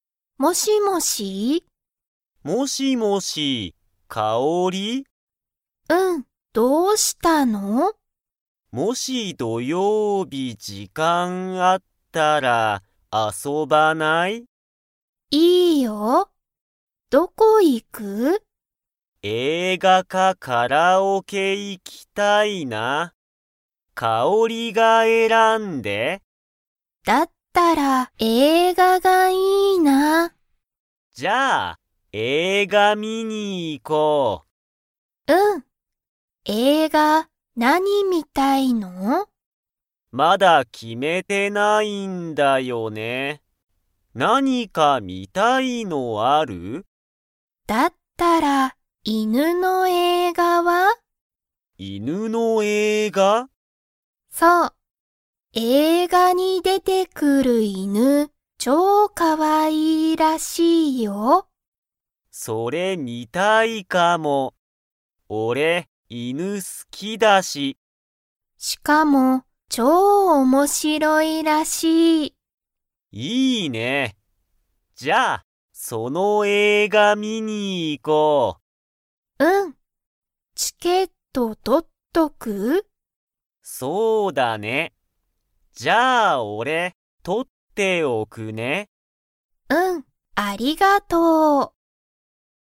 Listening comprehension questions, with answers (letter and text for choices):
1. カオリとトモヤは、____。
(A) 犬(いぬ)と遊(あそ)ぶ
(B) カラオケに行(い)く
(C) 映画(えいが)を観(み)る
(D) ご飯(はん)を食(た)べる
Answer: (C) 映画(えいが)を観(み)る

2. カオリとトモヤは、今(いま)チケットを持(も)っていますか?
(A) はい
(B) いいえ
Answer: (B) いいえ

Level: Level 2